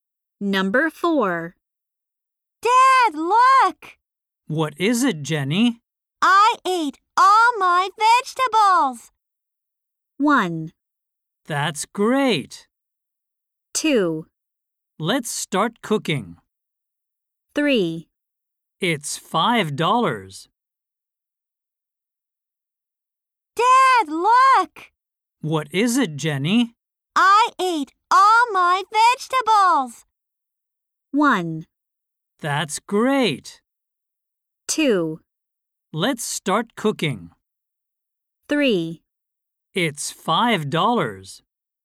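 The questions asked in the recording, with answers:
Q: I ate all my vegetables!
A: 1: That's great!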